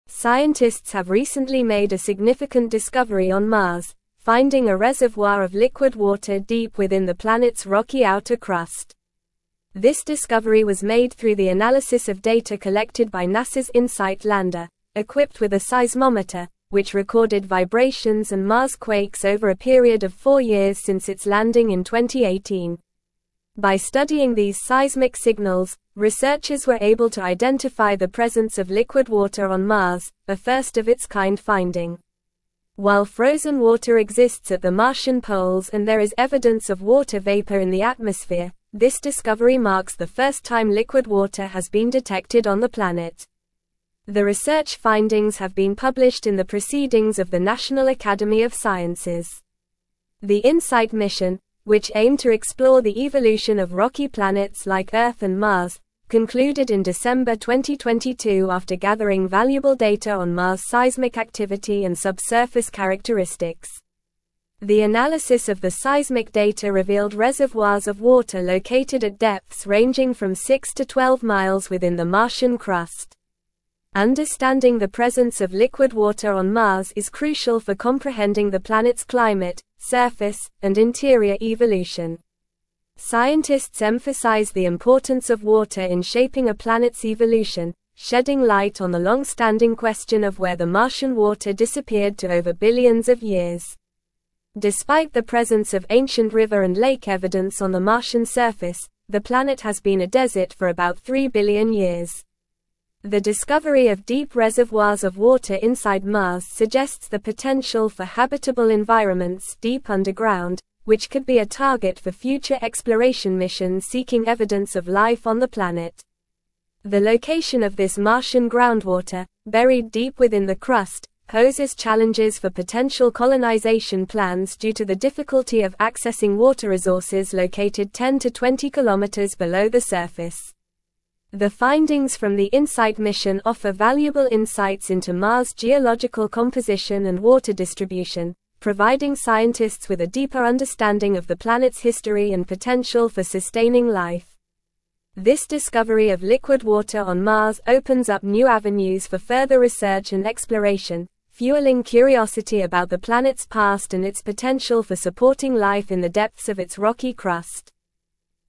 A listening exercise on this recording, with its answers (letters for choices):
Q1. Where was the liquid water found on Mars?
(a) On the surface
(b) In the Martian atmosphere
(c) In reservoirs deep within the rocky crust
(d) At the poles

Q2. What kind of data did NASA's Insight lander collect to make this discovery?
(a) Visual images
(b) Temperature readings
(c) Atmospheric pressure measurements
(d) Seismic data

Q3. When did the Insight mission conclude?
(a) December 2021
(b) January 2023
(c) November 2022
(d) December 2022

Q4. Why is understanding the presence of liquid water on Mars important?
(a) To study the Martian atmosphere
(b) To explore potential colonization opportunities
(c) To comprehend the planet's climate and evolution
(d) To understand the planet's magnetic field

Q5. What does the discovery of liquid water on Mars suggest about potential habitable environments?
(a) They could exist deep underground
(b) They are only on the surface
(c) They are near the Martian poles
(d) They are in the atmosphere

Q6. What is a challenge posed by the location of the Martian groundwater?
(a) Accessing water resources located deep below the surface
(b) Accessing water resources on the surface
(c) Dealing with water scarcity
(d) Managing water pollution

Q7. What do the findings from the Insight mission provide scientists with?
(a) Information about the Martian atmosphere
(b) Deeper understanding of Mars' geological composition and water distribution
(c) Details about Mars' plant life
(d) Insights into the history of Mars' moons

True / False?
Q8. The presence of liquid water on Mars could impact the planet's climate, surface, and interior evolution.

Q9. The Insight lander recorded silence and Mars quakes over a period of four years since its landing in 2018.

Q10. Scientists have discovered a reservoir of liquid water deep within Mars' rocky outer crust.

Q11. The Insight mission concluded in December 2022 after ignoring data on Mars' seismic activity and subsurface characteristics.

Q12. The research findings have been published in the Proceedings of the National Academy of Sciences.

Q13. The discovery of shallow reservoirs of water inside Mars suggests potential habitable environments deep underground.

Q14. The discovery was made through data collected by NASA's Insight lander equipped with a seismometer.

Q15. This is not the first time liquid water has been detected on Mars.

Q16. Scientists have recently made a significant discovery on Mars, (1)______ a reservoir of liquid water deep within the planet's rocky outer crust.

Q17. which recorded vibrations and Mars quakes over a (2)______ of four years since its landing in 2018.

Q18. While frozen water exists at the Martian poles and there is (3)______ of water vapor in the (4)______, this discovery marks the first time (5)______ water has been detected on the (6)______.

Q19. While frozen water exists at the Martian poles and there is (3)______ of water vapor in the (4)______, this discovery marks the first time (5)______ water has been detected on the (6)______.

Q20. While frozen water exists at the Martian poles and there is (3)______ of water vapor in the (4)______, this discovery marks the first time (5)______ water has been detected on the (6)______.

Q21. While frozen water exists at the Martian poles and there is (3)______ of water vapor in the (4)______, this discovery marks the first time (5)______ water has been detected on the (6)______.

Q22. The Insight mission, which (7)______ to explore the evolution of rocky planets like Earth and Mars,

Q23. The analysis of the seismic data revealed (8)______ of water located at depths ranging from six to twelve miles within the Martian crust.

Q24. shedding light on the long-standing question of where the (9)______ water disappeared to over (10)______ of (11)______.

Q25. shedding light on the long-standing question of where the (9)______ water disappeared to over (10)______ of (11)______.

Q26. shedding light on the long-standing question of where the (9)______ water disappeared to over (10)______ of (11)______.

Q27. Despite the presence of ancient (12)______ and lake evidence on the Martian surface,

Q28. The location of this Martian groundwater, buried deep within the (13)______, (14)______ challenges for potential colonization plans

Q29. The location of this Martian groundwater, buried deep within the (13)______, (14)______ challenges for potential colonization plans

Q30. The findings from the Insight mission offer valuable (15)______ into Mars' geological composition and water distribution, providing scientists with a deeper understanding of the planet's history and potential for (16)______ life.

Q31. The findings from the Insight mission offer valuable (15)______ into Mars' geological composition and water distribution, providing scientists with a deeper understanding of the planet's history and potential for (16)______ life.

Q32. What equipment did the NASA Insight lander use to make this discovery?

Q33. Why is the presence of liquid water on Mars significant for scientists?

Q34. What challenges do the deep reservoirs of water on Mars pose for potential colonization plans?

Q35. How long has Mars been considered a desert, according to the article?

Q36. How deep are the reservoirs of water located within the Martian crust?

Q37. What insights do the findings from the Insight mission provide about Mars' geological composition and history?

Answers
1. c
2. d
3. d
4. c
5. a
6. a
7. b
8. True
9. False
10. True
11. False
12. True
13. False
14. True
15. False
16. finding
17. period
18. evidence
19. atmosphere
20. liquid
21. planet
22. aimed
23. reservoirs
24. Martian
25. billions
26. years
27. river
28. crust
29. poses
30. insights
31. sustaining
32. The NASA Insight lander used a seismometer to record vibrations and Mars quakes, which helped identify the presence of liquid water on Mars.
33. The presence of liquid water on Mars is significant for scientists as it provides insights into the planet's climate, surface, interior evolution, and potential for sustaining life.
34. The deep reservoirs of water on Mars, located 10-20km below the surface, pose challenges for potential colonization plans due to the difficulty of accessing water resources at such depths.
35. Mars has been considered a desert for about three billion years.
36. The reservoirs of water on Mars are located at depths ranging from six to twelve miles within the Martian crust.
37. The findings from the Insight mission provide valuable insights into Mars' geological composition, water distribution, and history, deepening scientists' understanding of the planet.

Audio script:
Scientists have recently made a significant discovery on Mars, finding a reservoir of liquid water deep within the planet's rocky outer crust. This discovery was made through the analysis of data collected by NASA's Insight lander, equipped with a seismometer, which recorded vibrations and Mars quakes over a period of four years since its landing in 2018. By studying these seismic signals, researchers were able to identify the presence of liquid water on Mars, a first of its kind finding.
While frozen water exists at the Martian poles and there is evidence of water vapor in the atmosphere, this discovery marks the first time liquid water has been detected on the planet. The Insight mission, which aimed to explore the evolution of rocky planets like Earth and Mars, concluded in December 2022 after gathering valuable data on Mars' seismic activity and subsurface characteristics.
The analysis of the seismic data revealed reservoirs of water located at depths ranging from six to twelve miles within the Martian crust. Understanding the presence of liquid water on Mars is crucial for comprehending the planet's climate, surface, and interior evolution. Scientists emphasize the importance of water in shaping a planet's evolution, shedding light on the long-standing question of where the Martian water disappeared to over billions of years.
Despite the presence of ancient river and lake evidence on the Martian surface, the planet has been a desert for about three billion years. The discovery of deep reservoirs of water inside Mars suggests the potential for habitable environments deep underground, which could be a target for future exploration missions seeking evidence of life on the planet. The location of this Martian groundwater, buried deep within the crust, poses challenges for potential colonization plans due to the difficulty of accessing water resources located 10-20km below the surface.
The findings from the Insight mission offer valuable insights into Mars' geological composition and water distribution, providing scientists with a deeper understanding of the planet's history and potential for sustaining life. This discovery of liquid water on Mars opens up new avenues for further research and exploration, fueling curiosity about the planet's past and its potential for supporting life in the depths of its rocky crust.

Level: Level 4